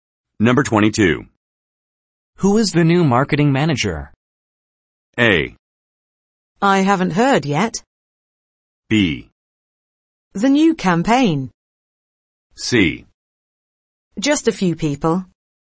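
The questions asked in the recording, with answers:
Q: Who is the new marketing manager?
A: A: I haven't heard yet.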